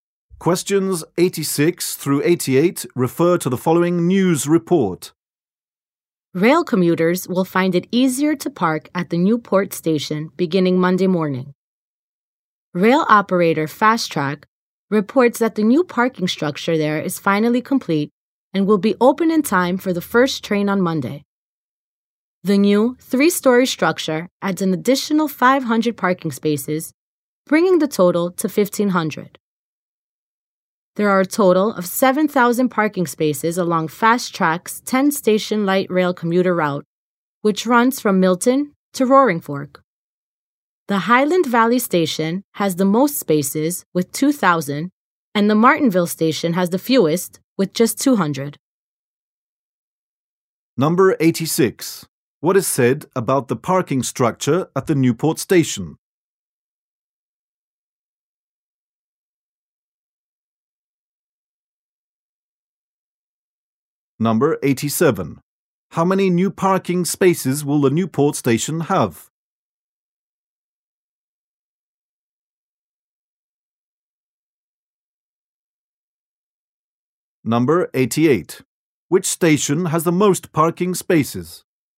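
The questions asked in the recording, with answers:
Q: What is said about the parking structure at the Newport Station?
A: It is complete and opens on Monday.

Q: How many new parking spaces will the Newport station have?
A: 500

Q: Which station has the most parking spaces?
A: Highland Valley Station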